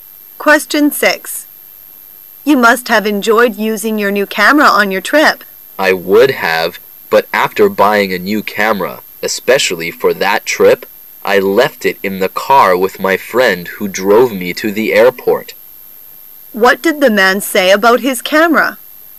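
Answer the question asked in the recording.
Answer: He left it in his friend's car and didn't use it on the trip.

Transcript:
[解析] W: You must have enjoyed using your new camera on your trip. M: I would have, but after buying a new camera especially for that trip, I left it in the car with my friend who drove me to the airport. Q: What did the man say about his camera?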